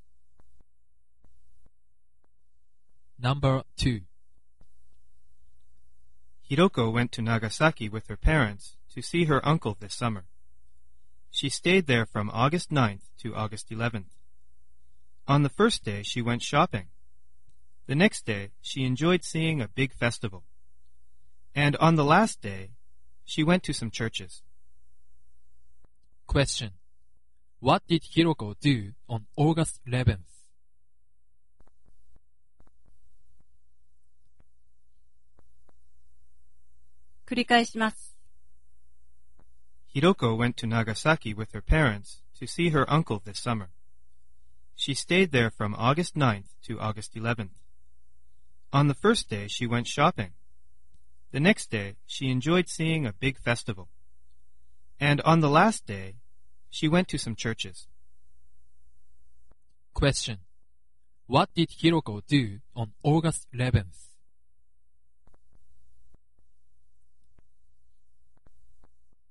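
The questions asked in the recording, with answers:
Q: What did Hiroko do on August 11th?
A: She went to some churches.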